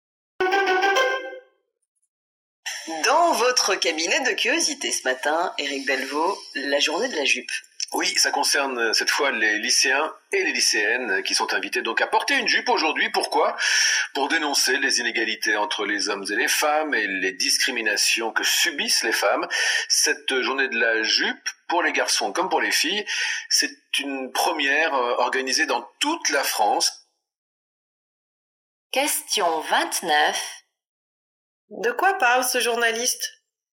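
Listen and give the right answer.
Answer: De la journée de la jupe contre les inégalités hommes-femmes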